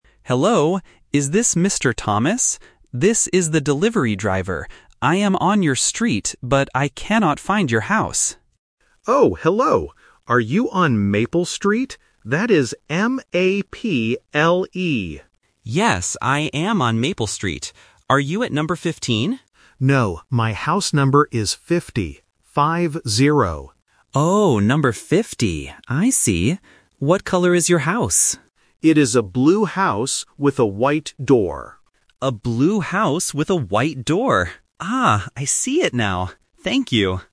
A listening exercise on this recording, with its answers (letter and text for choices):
Listen to the phone call between a delivery driver and a customer. Choose the correct answer (A, B, or C) for each question.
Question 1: How do you spell the street name?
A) M-A-B-L-E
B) M-A-P-L-E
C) M-A-P-E-L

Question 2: What is the customer's house number?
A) 15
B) 50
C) 55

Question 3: What does the customer's house look like?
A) A white house with a blue door.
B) A blue house with a black door.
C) A blue house with a white door.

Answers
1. B) M-A-P-L-E
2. B) 50
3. C) A blue house with a white door.

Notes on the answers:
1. The customer spells the street name clearly: "M-A-P-L-E". Option (A) is a phonetic trap because the letter 'P' and 'B' can sound similar. Option (C) mixes up the order of the last two letters.
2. The driver asks if the house is "number 15" (which is the trap), but the customer corrects him and says, "No, my house number is 50. Five-zero." Option (C) is not mentioned.
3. The customer explicitly states, "It is a blue house with a white door." Option (A) is a very common trap that swaps the colors of the house and the door. Option (B) uses a color ("black") that was never mentioned.